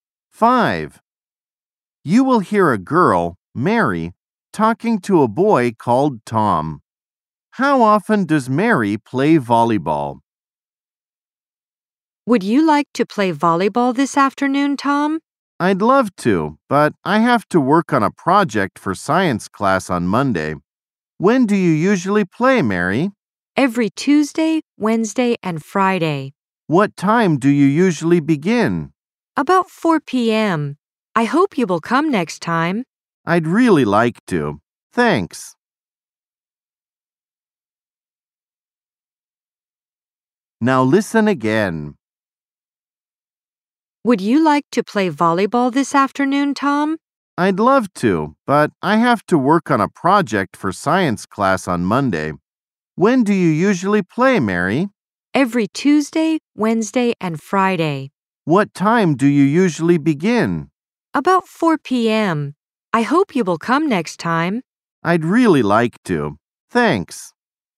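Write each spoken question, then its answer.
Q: How often does Mary play volleyball?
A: Three times a week (Tuesday, Wednesday and Friday)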